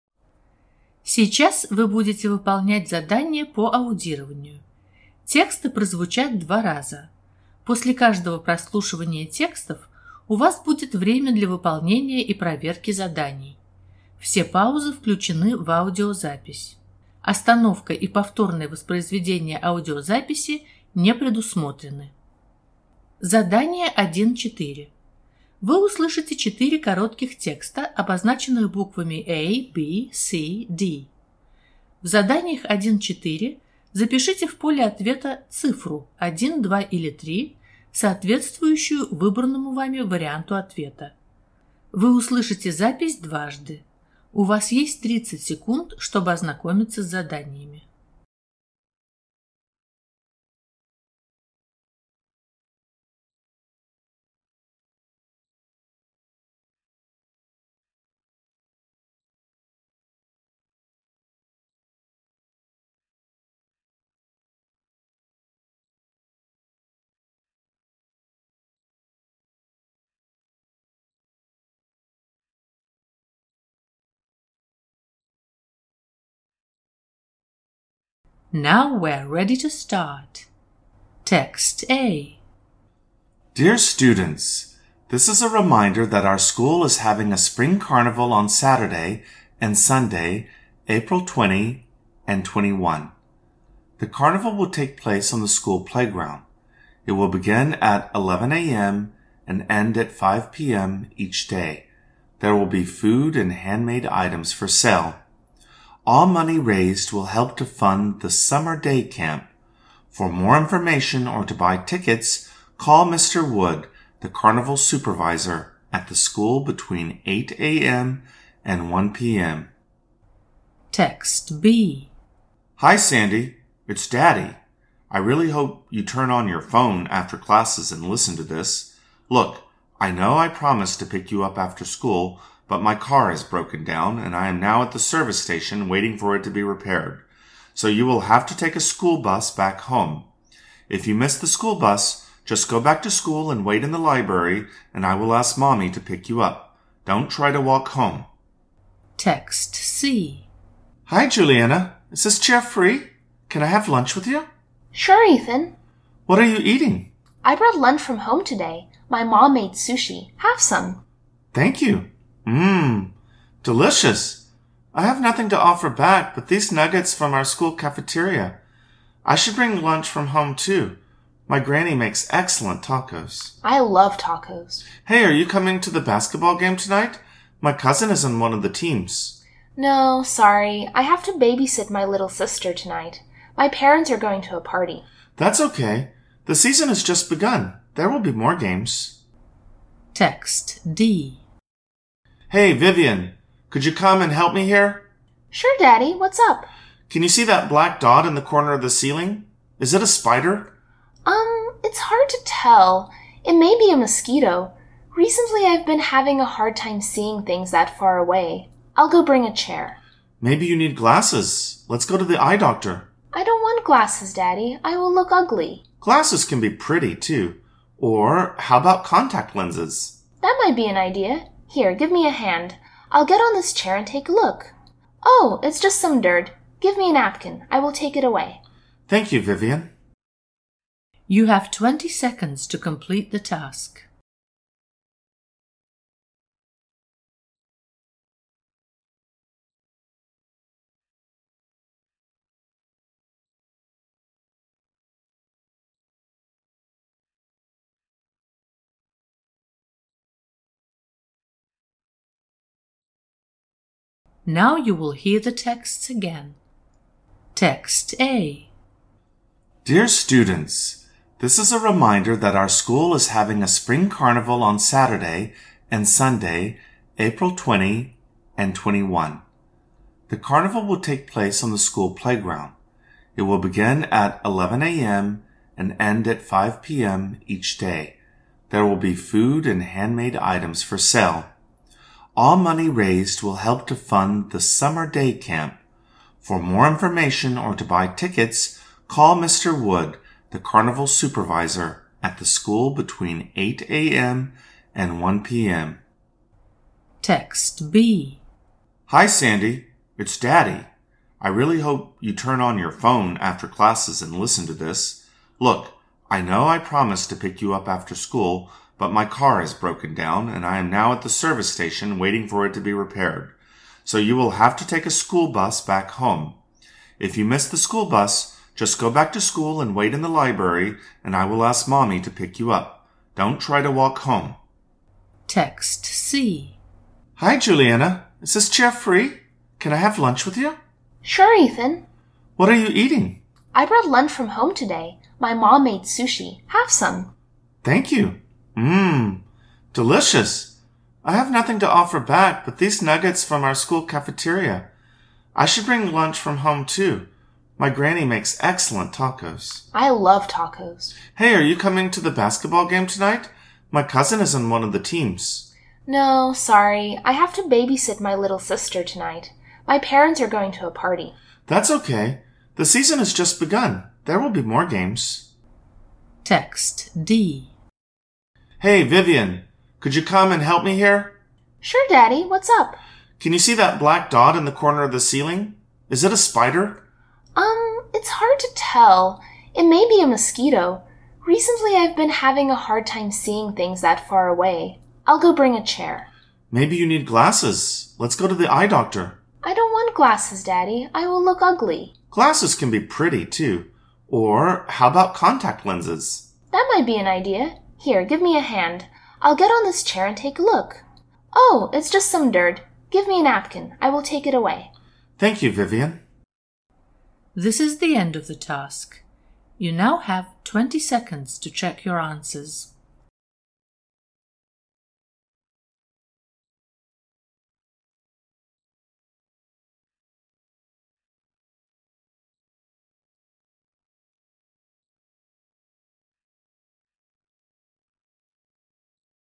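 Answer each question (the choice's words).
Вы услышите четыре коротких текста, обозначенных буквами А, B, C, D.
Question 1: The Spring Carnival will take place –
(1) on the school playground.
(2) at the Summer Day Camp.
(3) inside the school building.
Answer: on the school playground.

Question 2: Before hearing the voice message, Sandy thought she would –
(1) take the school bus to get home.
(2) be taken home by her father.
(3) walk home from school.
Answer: be taken home by her father.

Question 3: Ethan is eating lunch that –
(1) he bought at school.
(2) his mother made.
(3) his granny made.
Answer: he bought at school.

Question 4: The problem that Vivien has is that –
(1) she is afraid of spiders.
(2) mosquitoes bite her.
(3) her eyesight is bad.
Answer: her eyesight is bad.

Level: ОГЭ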